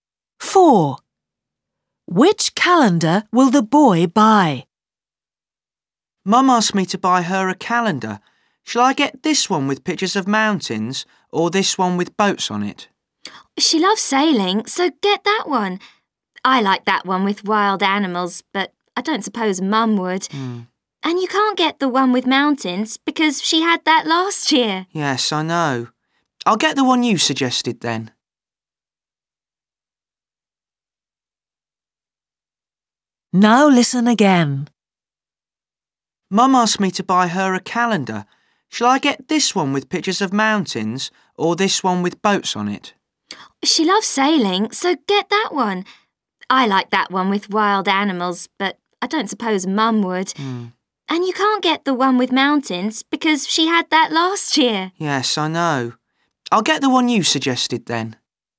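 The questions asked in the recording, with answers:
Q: Which calendar will the boy buy?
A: The one with boats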